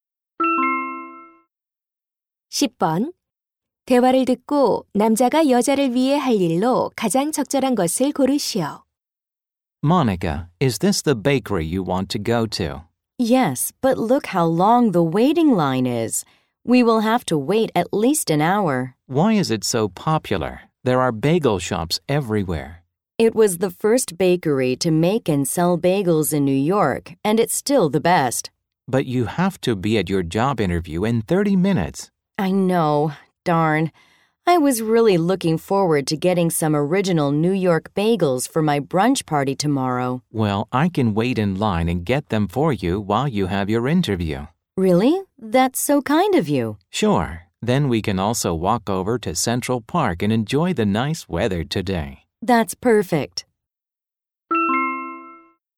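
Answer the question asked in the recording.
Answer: 줄을 서서 베이글 사 오기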